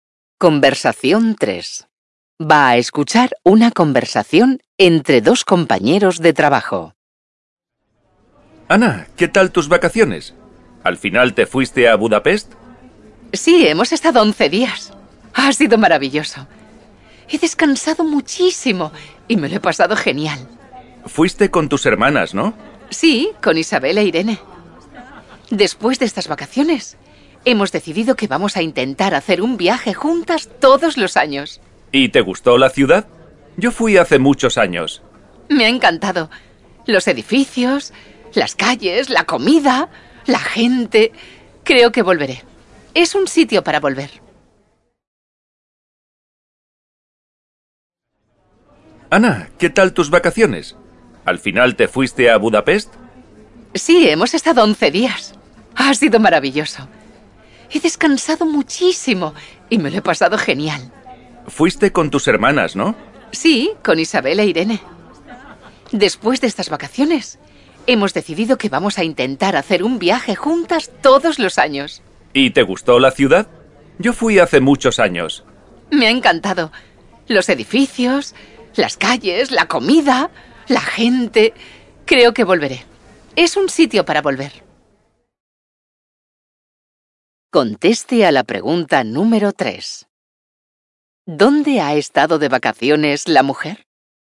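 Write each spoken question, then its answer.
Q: ¿Dónde ha estado de vacaciones la mujer?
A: En Budapest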